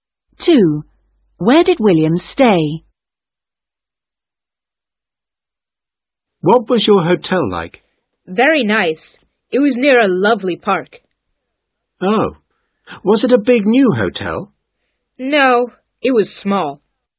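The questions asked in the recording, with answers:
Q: Where did William stay?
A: In a small hotel near a park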